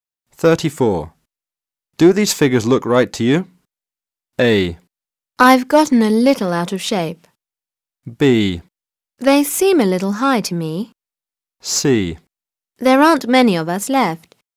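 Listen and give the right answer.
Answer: B: They seem a little high to me.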